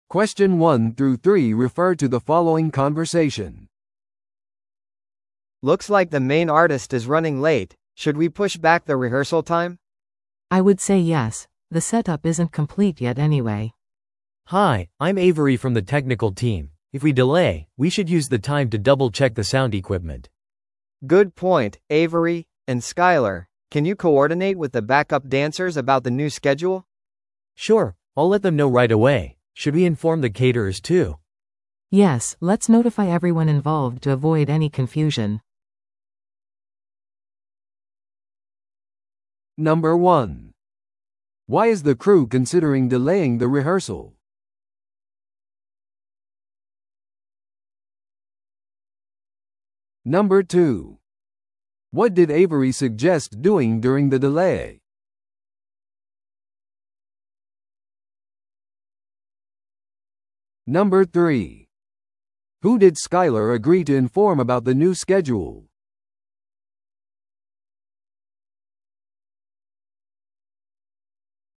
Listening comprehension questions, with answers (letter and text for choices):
Listen to the audio below and answer the questions.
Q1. Why is the crew considering delaying the rehearsal?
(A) テクニカルセットアップがまだ完了していない。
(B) ダンサーがまだ振り付けを覚えていない。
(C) 音響設備が故障している。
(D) メインアーティストが時間通りに到着していない。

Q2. What did Avery suggest doing during the delay?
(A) メインアーティストなしでリハーサルを始める。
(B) 音響設備のチェックをする。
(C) イベントのスポンサーに連絡をする。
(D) 残りのリハーサルをキャンセルする。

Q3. Who did Skyler agree to inform about the new schedule?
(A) メインアーティストのマネージャー。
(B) バックダンサー。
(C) 会場のオーナー。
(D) チケットを持っている人たち。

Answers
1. (D) メインアーティストが時間通りに到着していない。
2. (B) 音響設備のチェックをする。
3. (B) バックダンサー。

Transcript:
A: Looks like the main artist is running late. Should we push back the rehearsal time?
B: I would say yes. The setup isn't complete yet anyway.
C: Hi, I'm Avery from the technical team. If we delay, we should use the time to double-check the sound equipment.
A: Good point, Avery. And Skyler, can you coordinate with the backup dancers about the new schedule?
C: Sure, I'll let them know right away. Should we inform the caterers too?
B: Yes, let's notify everyone involved to avoid any confusion.